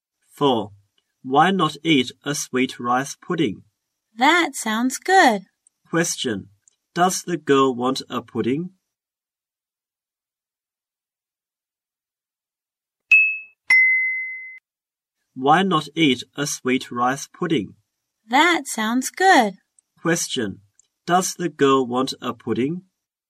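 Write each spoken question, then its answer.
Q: Does the girl want a pudding?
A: Yes.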